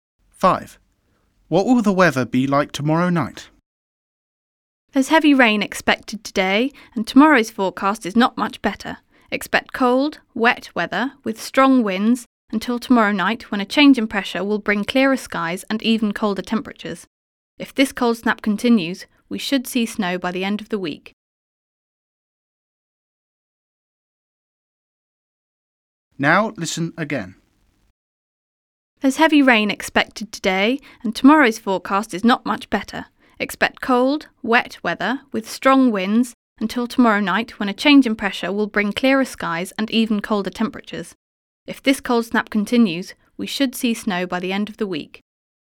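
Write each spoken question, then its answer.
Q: What will the weather be like tomorrow night?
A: clearer skies and even colder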